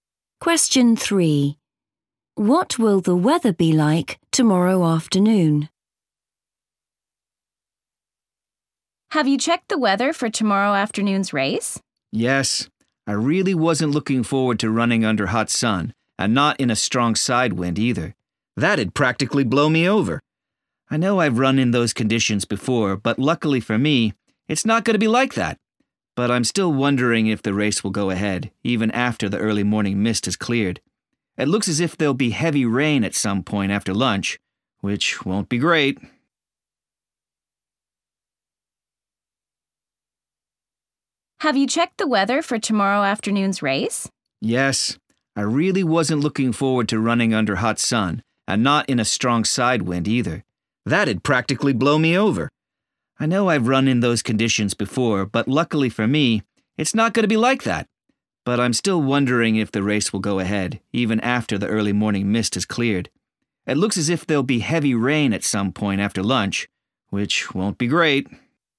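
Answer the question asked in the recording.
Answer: heavy rain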